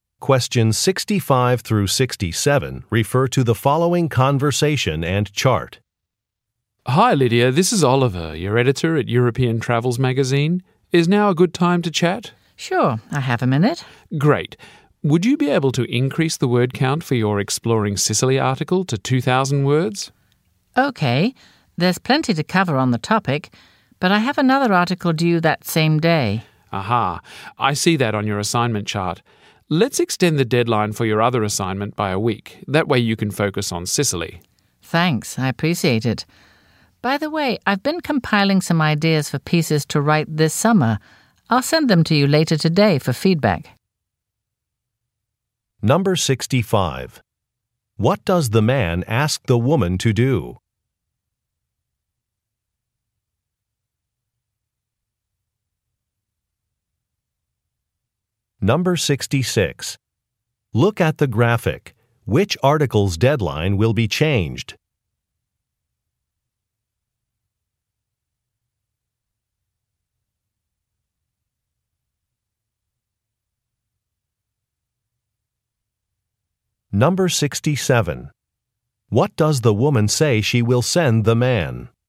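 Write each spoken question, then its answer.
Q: What does the man ask the woman to do?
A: Increase the word count of her Exploring Sicily article to 2,000 words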